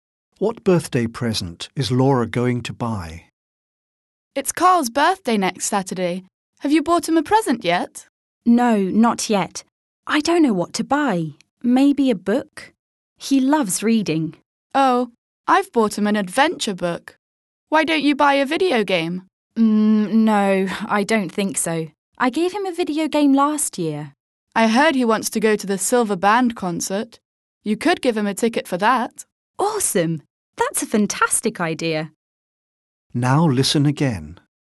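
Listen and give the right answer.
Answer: A ticket for the Silver Band concert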